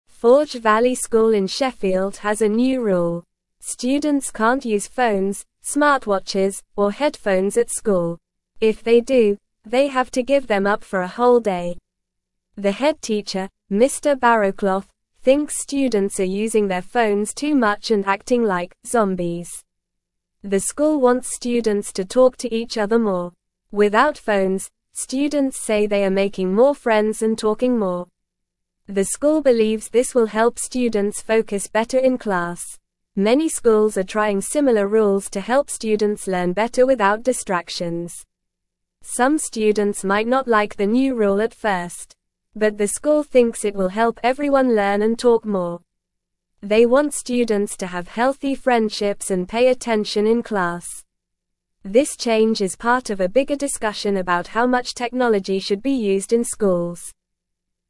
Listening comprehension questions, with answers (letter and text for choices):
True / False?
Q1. The school wants students to talk to each other more and make new friends without distractions.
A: True

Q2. The head teacher, Mr. Barrowclough, believes students are using their phones too much and acting like "zombies."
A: True

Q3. The school hopes that by increasing phone use, students will be able to focus better in class.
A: False

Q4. Many other schools are also trying out similar rules to help students learn without being distracted by technology.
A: True

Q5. The new rule at Forge Valley School is not part of a bigger discussion about how much technology should be allowed in schools.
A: False

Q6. If students break the new rule, they have to give up their devices for a whole day.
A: True

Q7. Students have reported that with phones, they are making more friends and talking more with their classmates.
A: False

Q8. Students at Forge Valley School in Sheffield can use phones, smartwatches, and headphones during school hours.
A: False

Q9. Forge Valley (1)______ in Sheffield has a new rule.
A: School

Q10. Students can't use phones, (2)______, or headphones at school.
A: smartwatches

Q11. If they do, they have to (3)______ them up for a whole day.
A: give

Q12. The head teacher, Mr. Barrowclough, thinks students are (4)______ their phones too much and acting like "zombies."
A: using

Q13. The (5)______ wants students to talk to each other (6)______.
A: school

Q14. The (5)______ wants students to talk to each other (6)______.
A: more

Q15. (7)______ schools are trying (8)______ (9)______s to help students learn better without distractions.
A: Many

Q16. (7)______ schools are trying (8)______ (9)______s to help students learn better without distractions.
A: similar

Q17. (7)______ schools are trying (8)______ (9)______s to help students learn better without distractions.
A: rule

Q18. They want students to (10)______ healthy friendships and pay attention in class.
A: have

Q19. This (11)______ is part of a bigger discussion about how much (12)______ should be used in schools.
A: change

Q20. This (11)______ is part of a bigger discussion about how much (12)______ should be used in schools.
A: technology

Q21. What new rule does Forge Valley School have about phones, smartwatches, and headphones?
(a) Students can use them anytime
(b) Students can only use them during lunch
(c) Students can't use them at school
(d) Students can use them in class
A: (c) Students can't use them at school

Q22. Who is the head teacher at Forge Valley School?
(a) Mr. Smith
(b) Mr. Barrowclough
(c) Ms. Johnson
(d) Mrs. Patel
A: (b) Mr. Barrowclough

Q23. Why does Mr. Barrowclough think students are acting like "zombies"?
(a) Because they talk too much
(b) Because they sleep in class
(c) Because they use their phones too much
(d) Because they don't eat lunch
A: (c) Because they use their phones too much

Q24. What does the school hope will happen if students talk to each other more?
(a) They will use their phones more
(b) They will study less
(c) They will watch more TV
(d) They will make more friends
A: (d) They will make more friends

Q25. Why does the school believe the new rule will help students focus better in class?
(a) Because they won't be distracted by their phones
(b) Because they will be allowed to use their phones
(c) Because they will have more homework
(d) Because they will have more tests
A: (a) Because they won't be distracted by their phones

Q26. How do many schools feel about using phones in class?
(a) They want students to use phones all the time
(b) They are trying similar rules to reduce distractions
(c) They encourage students to watch videos in class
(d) They ask students to bring extra phones to school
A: (b) They are trying similar rules to reduce distractions

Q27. How do some students feel about the new rule at first?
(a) They love it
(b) They are excited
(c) They are sad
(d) They might not like it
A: (d) They might not like it

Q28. What is the new rule at Forge Valley School part of a bigger discussion about?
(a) How much technology should be used in schools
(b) How many books students should read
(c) How long recess should be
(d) How many sports teams the school should have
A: (a) How much technology should be used in schools

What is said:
Forge Valley School in Sheffield has a new rule. Students can't use phones, smartwatches, or headphones at school. If they do, they have to give them up for a whole day. The head teacher, Mr. Barrowclough, thinks students are using their phones too much and acting like "zombies."
The school wants students to talk to each other more. Without phones, students say they are making more friends and talking more. The school believes this will help students focus better in class. Many schools are trying similar rules to help students learn better without distractions.
Some students might not like the new rule at first. But the school thinks it will help everyone learn and talk more. They want students to have healthy friendships and pay attention in class. This change is part of a bigger discussion about how much technology should be used in schools.

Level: Level 2